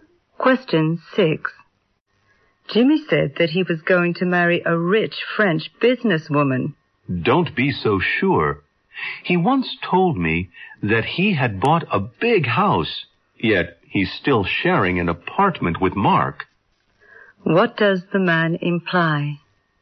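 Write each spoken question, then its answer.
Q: What does the man imply?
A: Jimmy's words can't be trusted.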